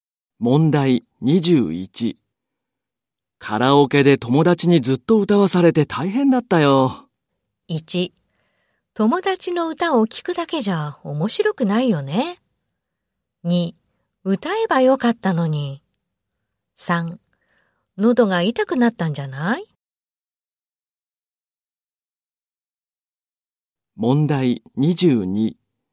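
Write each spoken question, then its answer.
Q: カラオケで友達にずっと歌わされて大変だったよ。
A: 3: 喉が痛くなったんじゃない?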